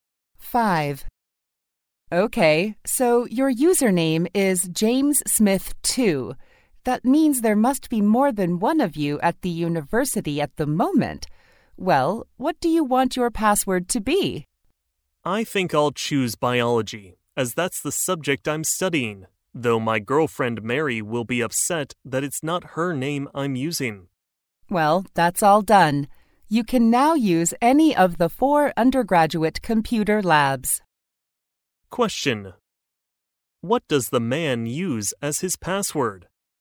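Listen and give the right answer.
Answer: Biology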